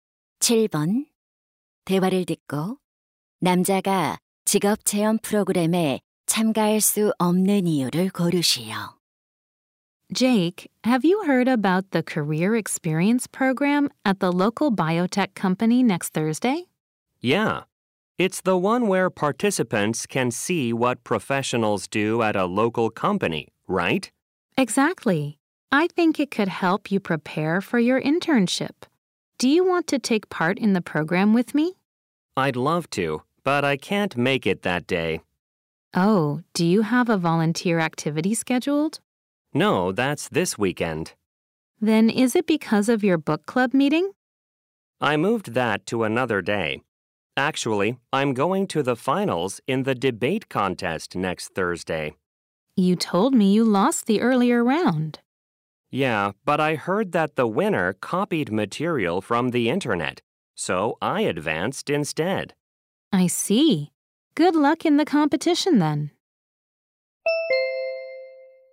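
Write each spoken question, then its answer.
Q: 대화를 듣고 남자가 직업 체험 프로그램에 참가할 수 없는 이유를 고르시오.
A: 토론 대회 결승에 나가야 해서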